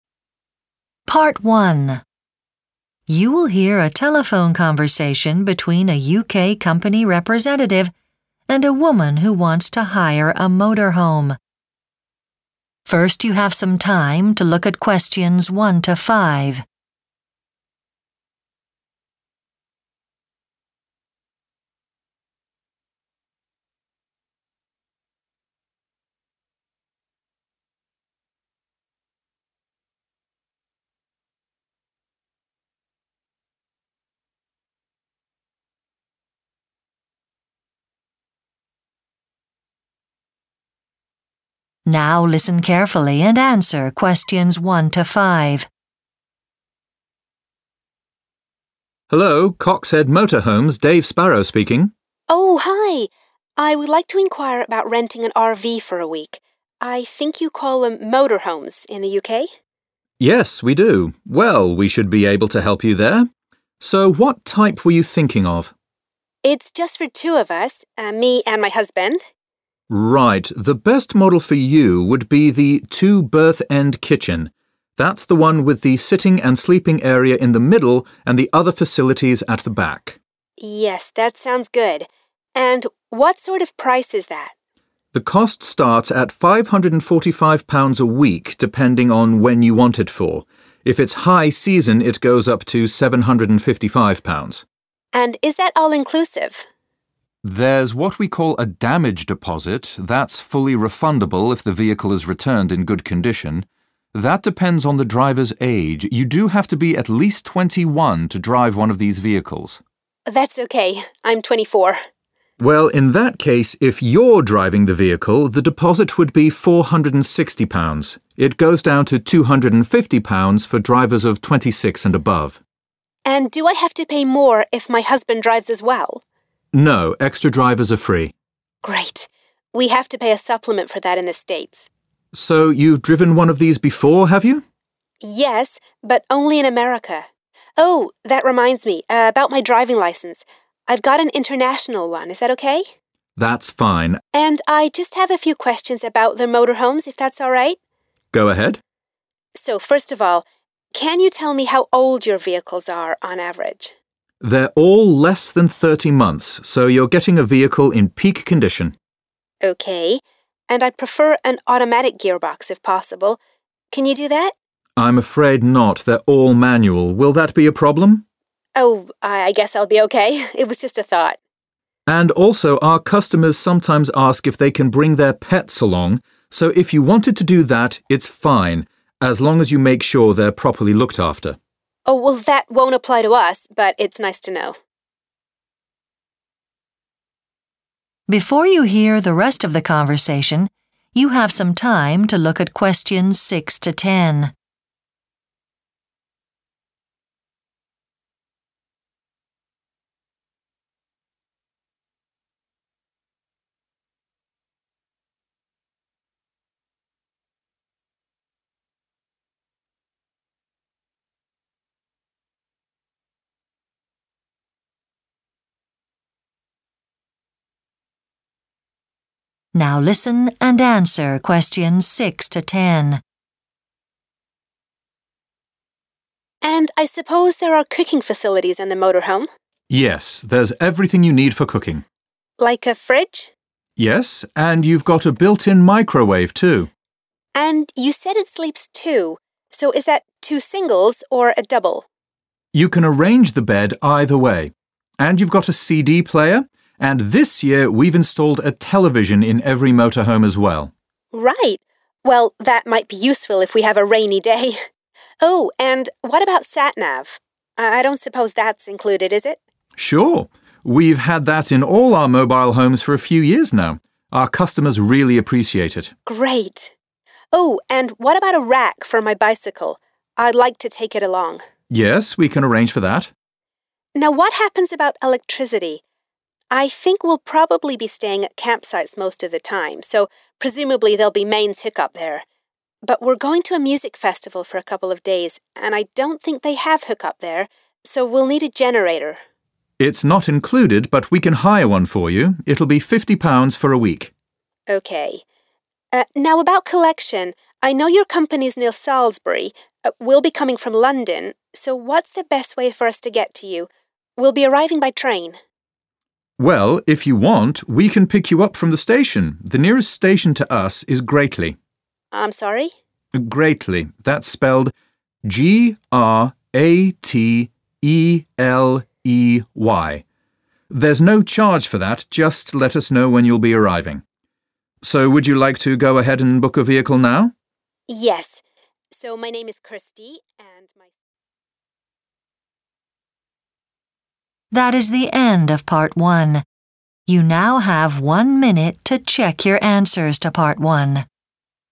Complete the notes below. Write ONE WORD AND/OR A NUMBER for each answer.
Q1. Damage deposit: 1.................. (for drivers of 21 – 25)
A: 460

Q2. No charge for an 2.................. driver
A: extra

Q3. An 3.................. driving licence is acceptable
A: international

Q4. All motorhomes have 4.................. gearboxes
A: manual

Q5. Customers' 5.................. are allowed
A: pets

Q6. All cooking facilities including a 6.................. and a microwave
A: fridge

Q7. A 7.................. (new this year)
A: television

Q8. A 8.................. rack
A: bicycle

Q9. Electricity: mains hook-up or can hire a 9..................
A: generator

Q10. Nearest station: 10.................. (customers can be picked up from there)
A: Grateley